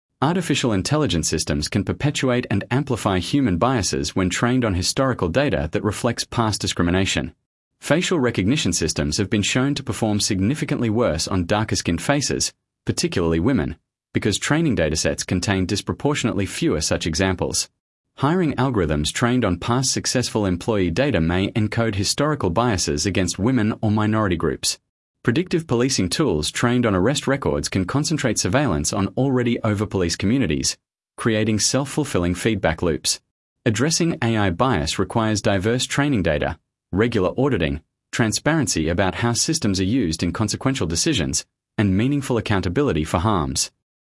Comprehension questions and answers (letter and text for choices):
Task reminder: Read all options before the audio starts. Select the paragraph that best summarises the recording. The correct answer matches the main idea and tone, not just one detail.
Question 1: Sample Text 1 — Artificial Intelligence Bias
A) A. AI systems are entirely objective because they process data without human emotional involvement.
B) B. AI systems can perpetuate and amplify social biases present in their training data, making fairness, transparency, and accountability essential design requirements.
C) C. The solution to AI bias is to remove all demographic data from training datasets, which eliminates discrimination entirely.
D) D. AI bias is a theoretical concern that has not yet produced documented real-world harms.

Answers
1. B) B. AI systems can perpetuate and amplify social biases present in their training data, making fairness, transparency, and accountability essential design requirements.